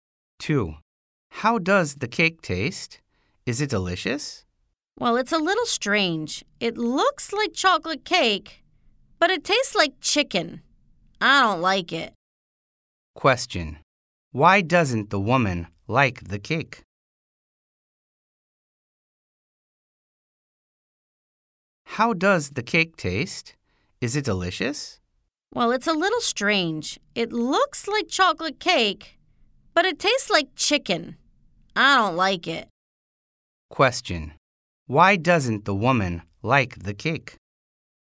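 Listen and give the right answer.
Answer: It looks like chocolate cake but tastes like chicken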